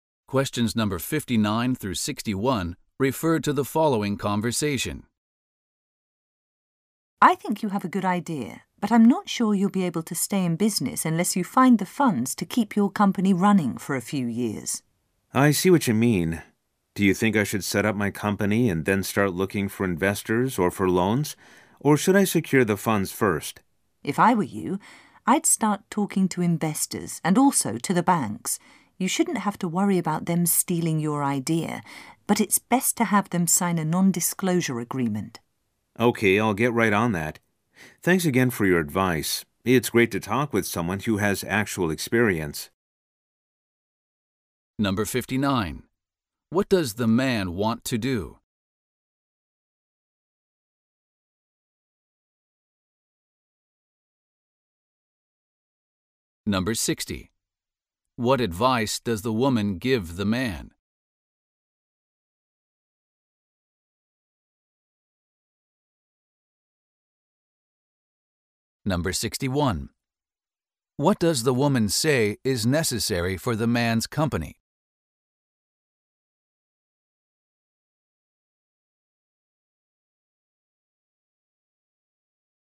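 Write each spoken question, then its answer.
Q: What does the man want to do?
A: Start his own company

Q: What does the woman say is necessary for the man's company?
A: Funds to keep it running for a few years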